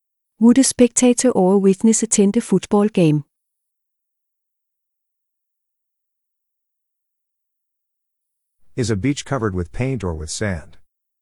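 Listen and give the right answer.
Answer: A spectator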